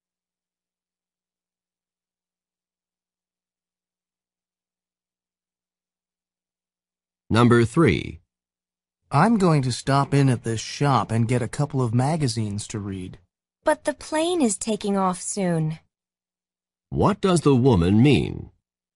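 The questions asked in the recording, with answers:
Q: What does the woman mean?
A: There may not be enough time before the plane leaves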